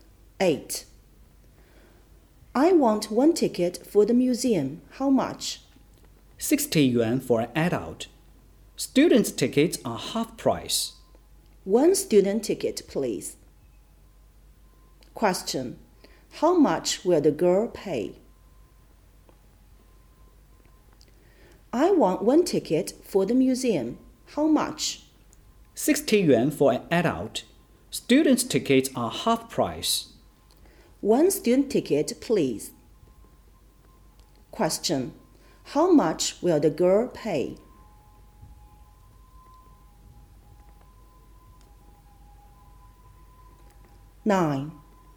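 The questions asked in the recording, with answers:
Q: How much will the girl pay?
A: 30 yuan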